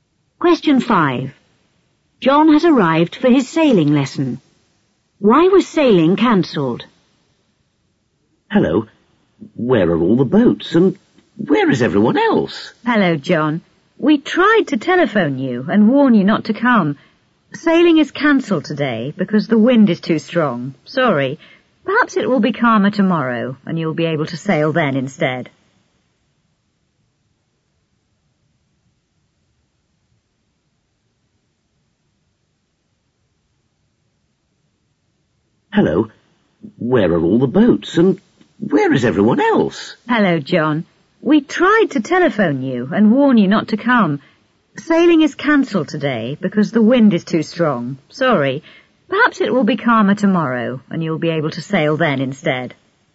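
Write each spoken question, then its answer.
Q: Why was sailing cancelled?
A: Because the wind was too strong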